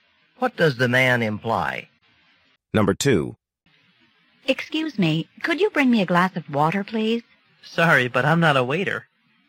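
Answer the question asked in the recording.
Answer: He can't bring the water because he isn't a waiter.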